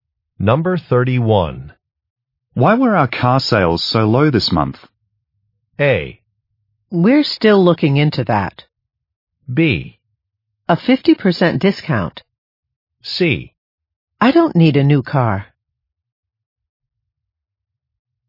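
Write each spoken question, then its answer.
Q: Why were our car sales so low this month?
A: A: We're still looking into that.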